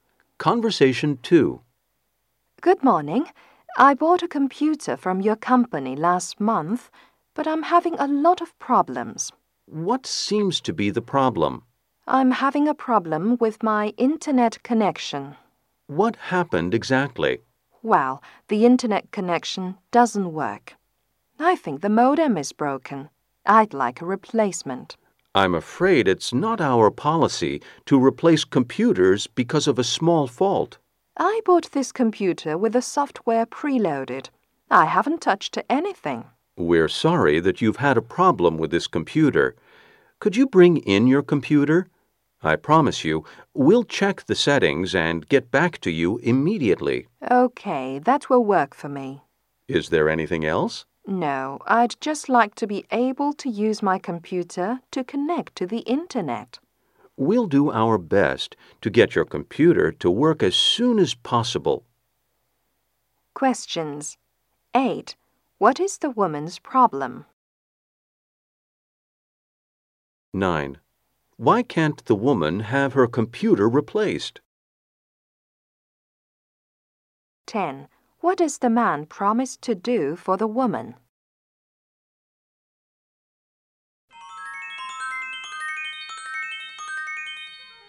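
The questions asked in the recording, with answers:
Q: What is the woman's problem?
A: Her internet connection doesn't work.

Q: Why can't the woman have her computer replaced?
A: It's not company policy to replace computers for a small fault.

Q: What does the man promise to do for the woman?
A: Check the settings and get back to her immediately.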